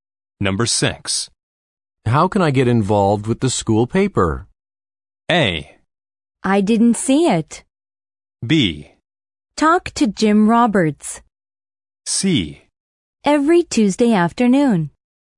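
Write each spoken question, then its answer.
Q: How can I get involved with the school paper?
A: B: Talk to Jim Roberts.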